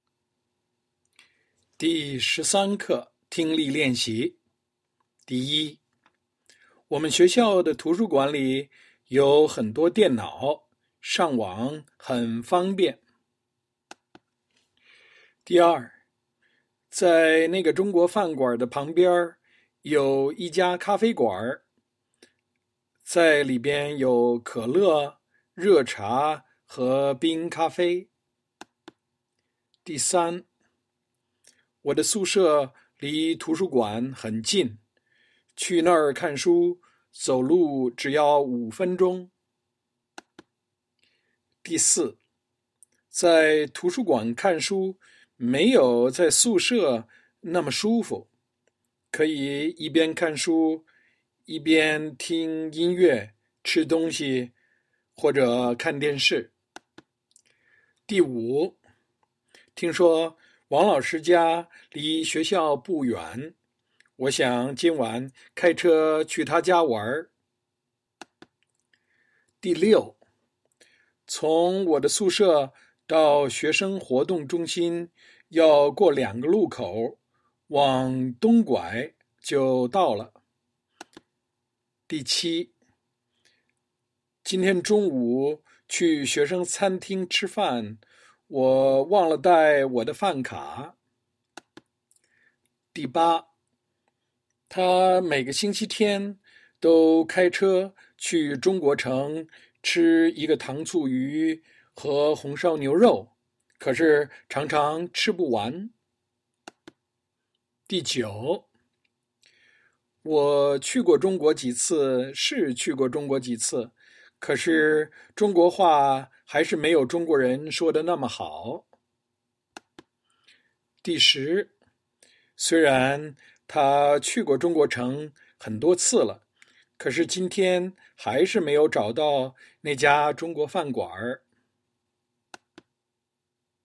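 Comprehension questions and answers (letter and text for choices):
Write full sentences; one bonus point for translation.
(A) 去那儿看书,走路只要5分钟。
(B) 要过两个路口,往东拐,就到了。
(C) 可是今天还是没有找到那家中国饭馆。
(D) 吃一个糖醋鱼和红烧牛肉,可是常常吃不完。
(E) 可以一边看书一边听音乐,吃东西,看电视。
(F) 上网很方便。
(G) 我忘了带我的饭卡。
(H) 在里边有可乐,热茶和冰咖啡。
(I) 我想今晚开车去他家玩。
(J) 可是中国话还是没有中国人说得那么好。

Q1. 我们学校的图书馆里有很多电脑,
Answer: (F) 上网很方便。

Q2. 在那个中国饭馆的旁边有一家咖啡馆,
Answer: (H) 在里边有可乐,热茶和冰咖啡。

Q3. 我的宿舍离图书馆很近,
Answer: (A) 去那儿看书,走路只要5分钟。

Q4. 在图书馆看书没有在宿舍那么舒服,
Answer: (E) 可以一边看书一边听音乐,吃东西,看电视。

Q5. 听说王老师家离学校不远,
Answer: (I) 我想今晚开车去他家玩。

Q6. 从我的宿舍到学生活动中心,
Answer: (B) 要过两个路口,往东拐,就到了。

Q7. 今天中午去学生餐厅吃饭,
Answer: (G) 我忘了带我的饭卡。

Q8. 她每个星期天都开车去中国城,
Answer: (D) 吃一个糖醋鱼和红烧牛肉,可是常常吃不完。

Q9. 我去过中国几次是去过中国几次,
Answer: (J) 可是中国话还是没有中国人说得那么好。

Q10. 虽然她去过中国城很多次了,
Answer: (C) 可是今天还是没有找到那家中国饭馆。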